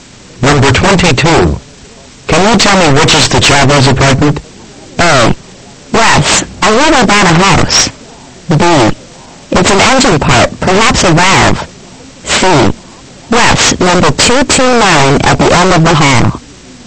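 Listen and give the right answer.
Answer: C: Yes, number 229 at the end of the hall.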